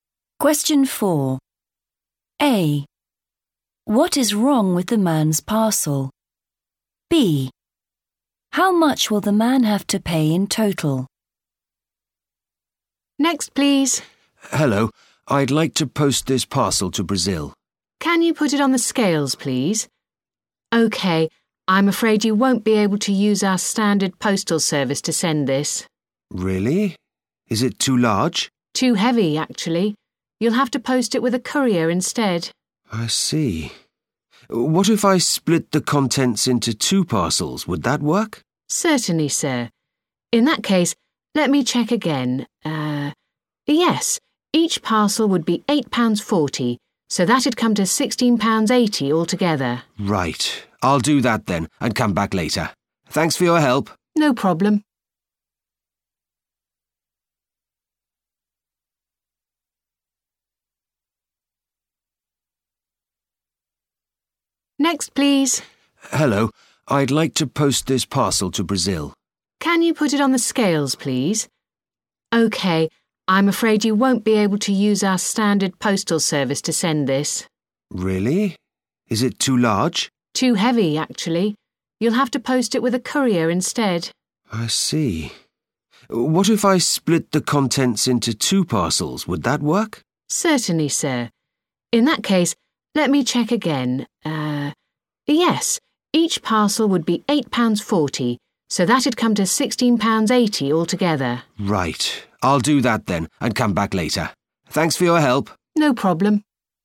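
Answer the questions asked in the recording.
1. too heavy
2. £16.80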